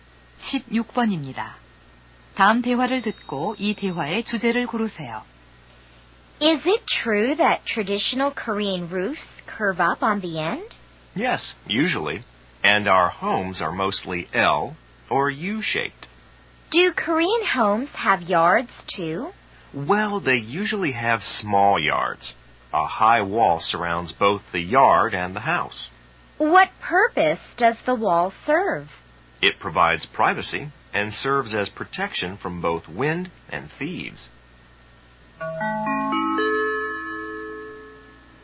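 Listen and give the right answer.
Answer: 한국 전통 가옥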